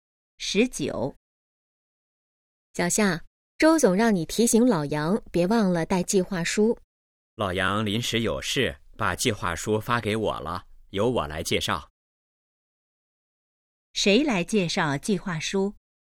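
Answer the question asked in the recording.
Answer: 小夏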